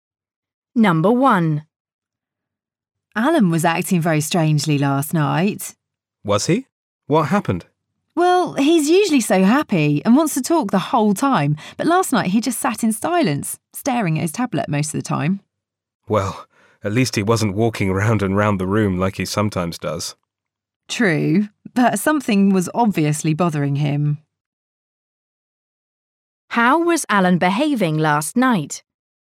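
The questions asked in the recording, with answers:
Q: How was Alan behaving last night?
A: He sat in silence staring at his tablet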